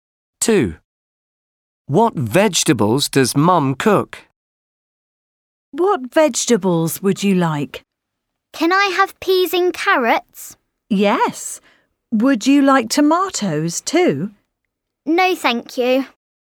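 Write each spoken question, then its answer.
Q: What vegetables does Mum cook?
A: peas and carrots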